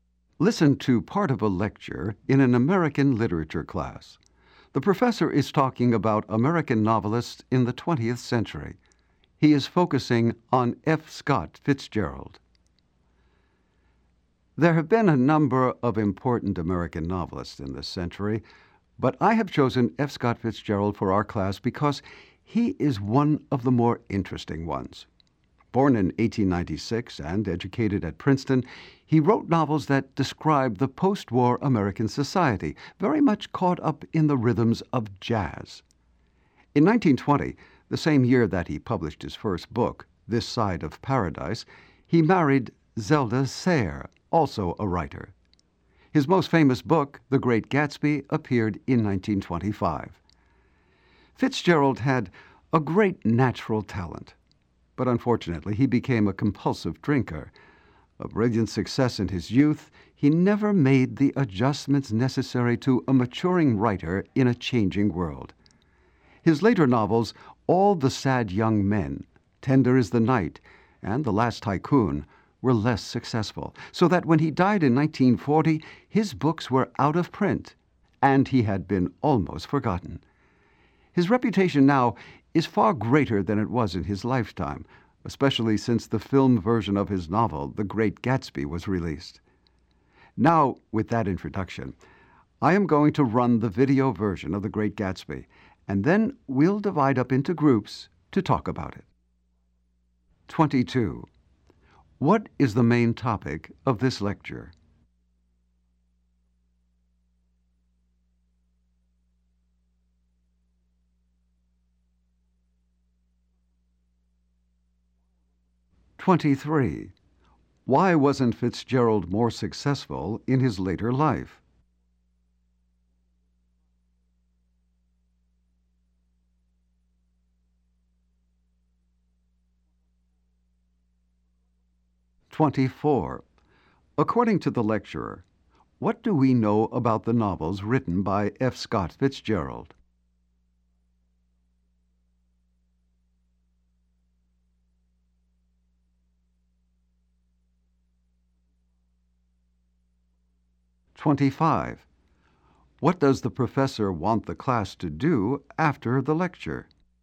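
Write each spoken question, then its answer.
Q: What is the main topic of this lecture?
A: F. Scott Fitzgerald

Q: Why wasn't Fitzgerald more successful in his later life?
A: He became a compulsive drinker and didn't adjust to a changing world.

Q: What does the professor want the class to do after the lecture?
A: Watch the video of The Great Gatsby, then discuss it in groups.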